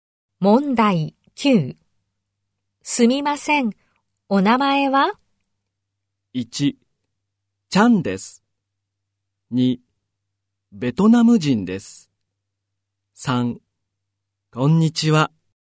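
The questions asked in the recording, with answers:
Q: すみません、お名前は?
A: 1: ちゃんです。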